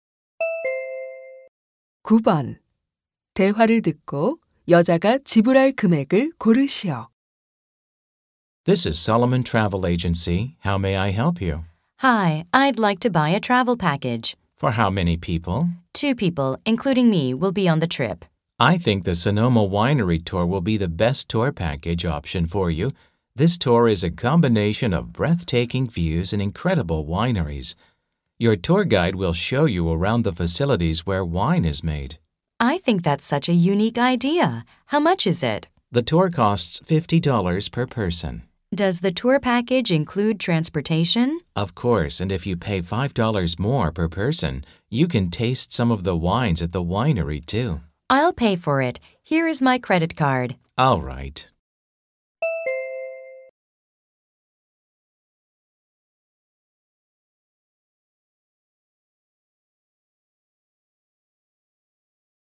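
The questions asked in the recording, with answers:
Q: 대화를 듣고 여자가 지불할 금액을 고르시오.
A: 110달러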